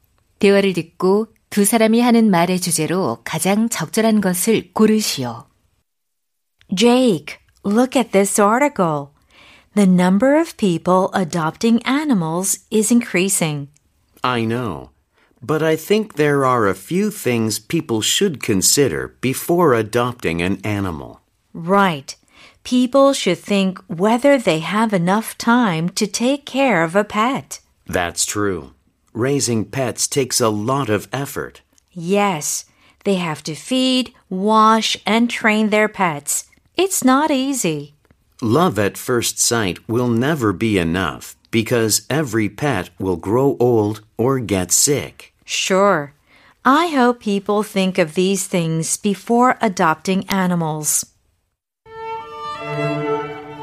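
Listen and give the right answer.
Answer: 반려동물 입양 전에 고려해야 할 사항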